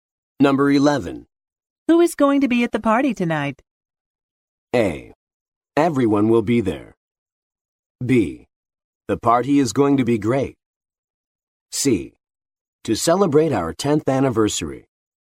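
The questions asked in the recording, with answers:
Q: Who is going to be at the party tonight?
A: A: Everyone will be there.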